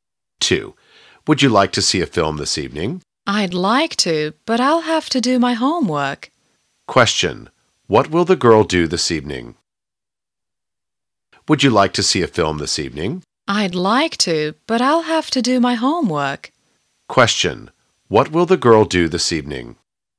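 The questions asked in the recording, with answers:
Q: What will the girl do this evening?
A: Do her homework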